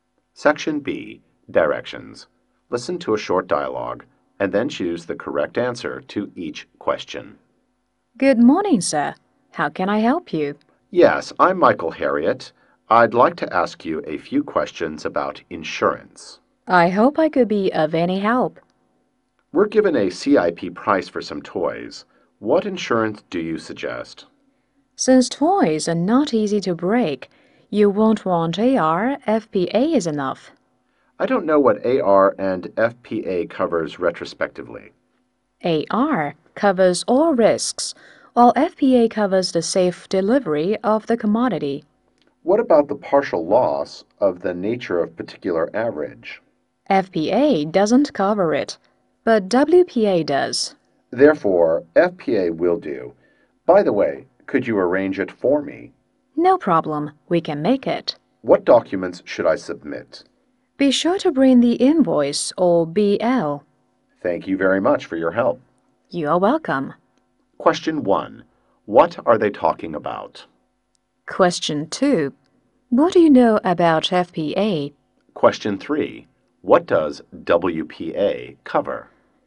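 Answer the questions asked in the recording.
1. Insurance
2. It covers the safe delivery of the goods but not partial loss
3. Partial loss (particular average)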